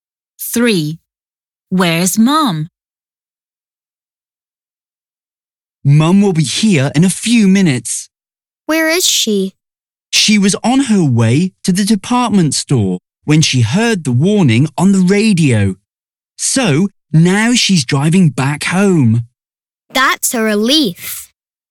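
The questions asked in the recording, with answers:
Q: Where's mum?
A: driving back home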